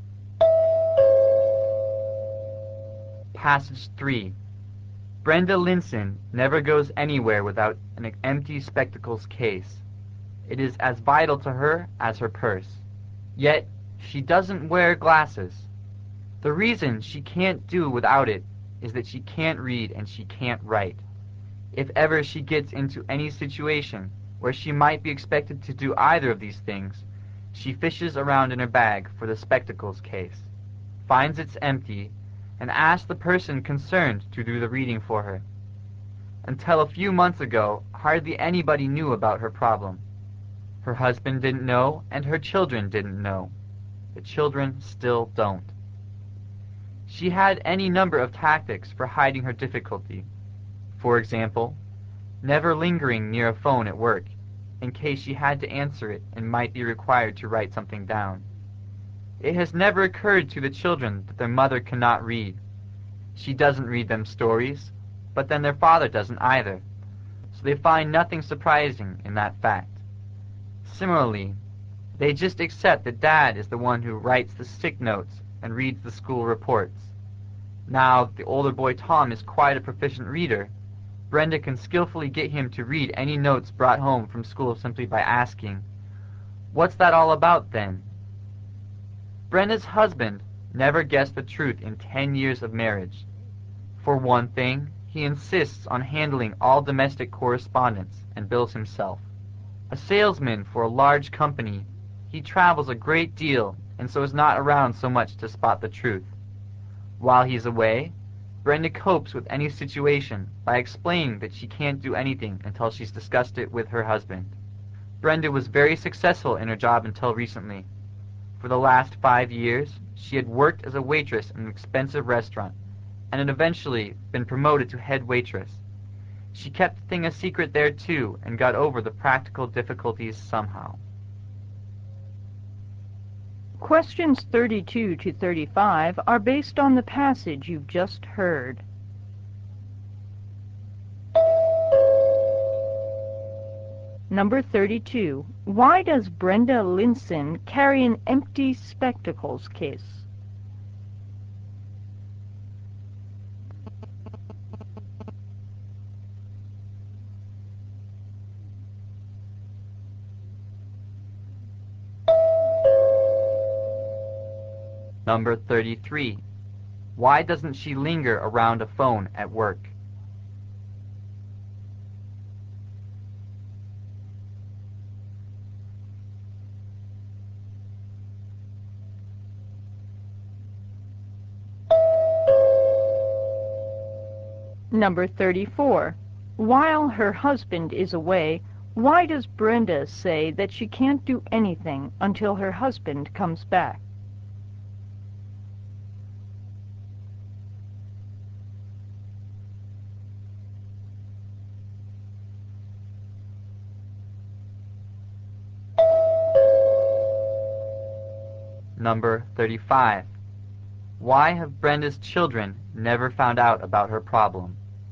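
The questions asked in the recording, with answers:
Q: Why does Brenda Linson carry an empty spectacles case?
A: To hide that she can't read or write

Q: Why doesn't she linger around a phone at work?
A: She might have to write something down

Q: While her husband is away, why does Brenda say that she can't do anything until her husband comes back?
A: To hide that she can't read or write

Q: Why have Brenda's children never found out about her problem?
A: Their father doesn't read them stories either, and he handles the notes and reports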